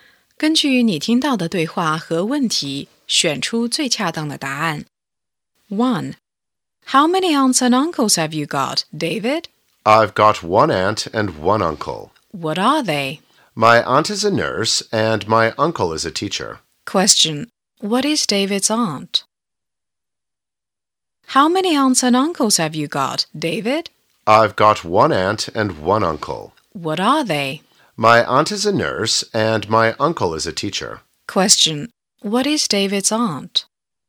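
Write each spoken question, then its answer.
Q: What is David's aunt?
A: A nurse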